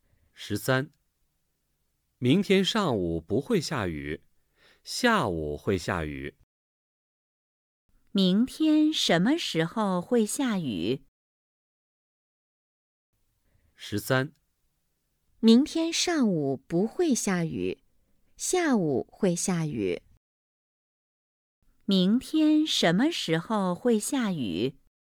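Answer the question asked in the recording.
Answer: 明天下午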